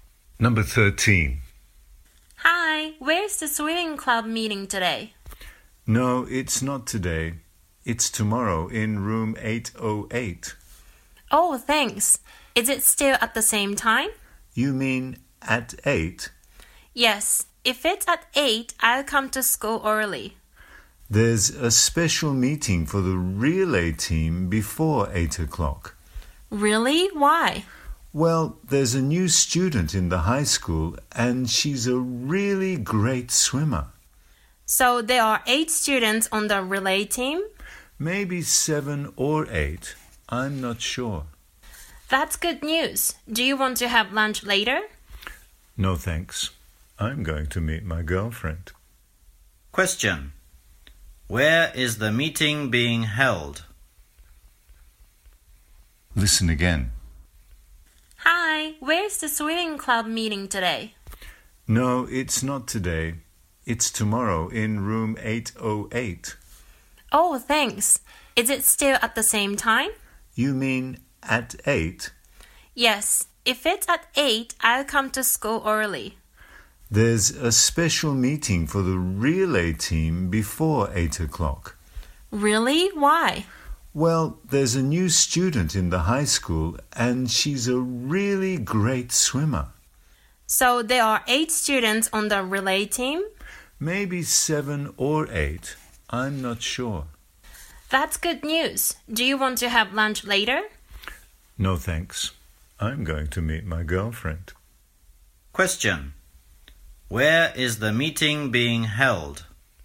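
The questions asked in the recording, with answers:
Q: Where is the meeting being held?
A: In room 808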